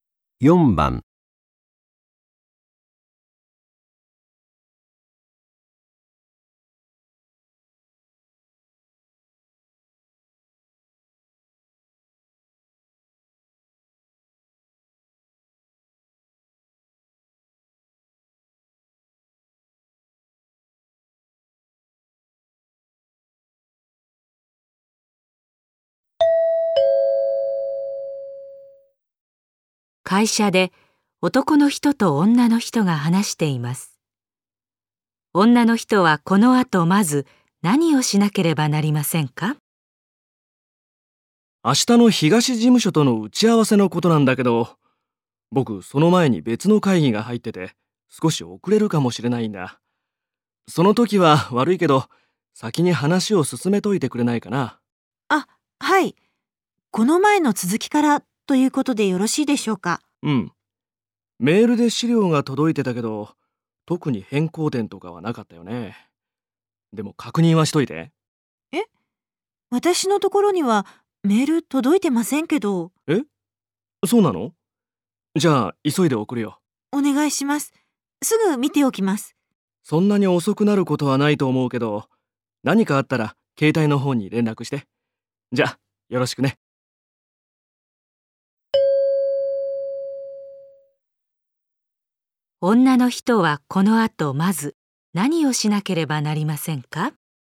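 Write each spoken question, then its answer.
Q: 女の人はこのあとまず何をしなければなりませんか?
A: 送られてくるメールの資料を確認する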